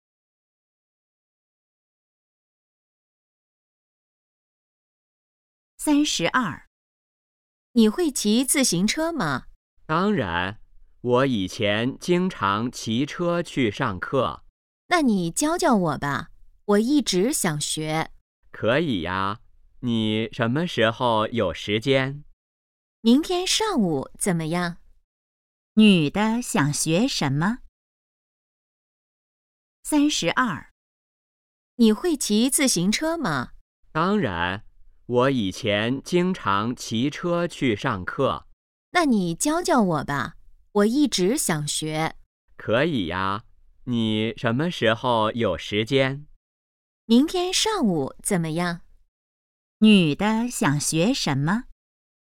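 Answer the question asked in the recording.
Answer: 骑自行车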